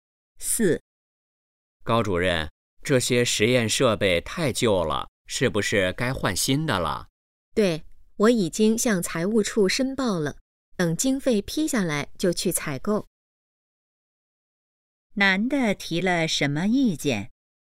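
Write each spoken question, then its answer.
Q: 男的提了什么意见?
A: 实验设备太旧,该换新的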